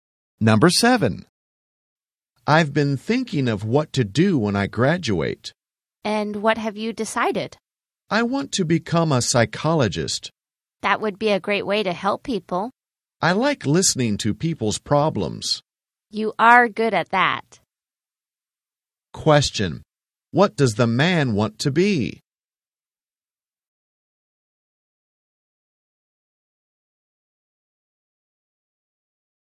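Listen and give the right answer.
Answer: A psychologist.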